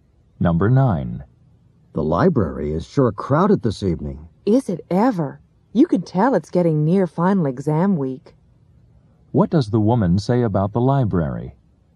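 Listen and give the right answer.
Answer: It's very crowded because final exams are near.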